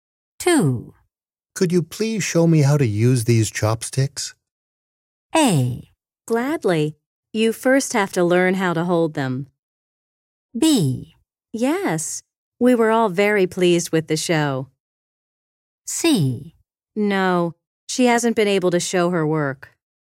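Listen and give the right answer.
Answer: A: Gladly. You first have to learn how to hold them.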